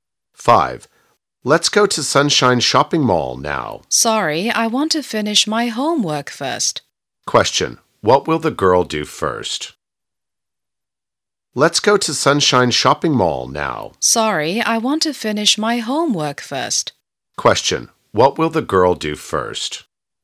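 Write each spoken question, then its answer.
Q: What will the girl do first?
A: Finish her homework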